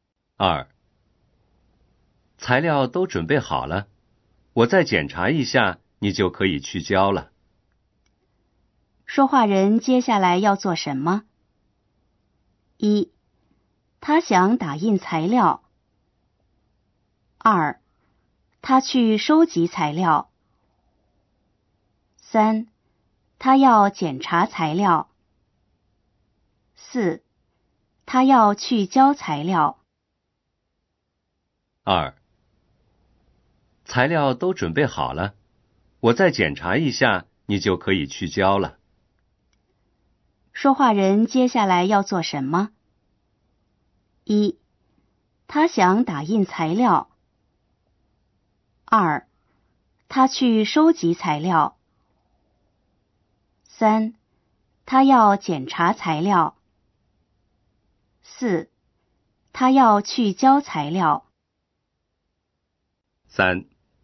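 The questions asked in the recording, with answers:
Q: 说话人接下来要做什么?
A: 3: 他要检查材料。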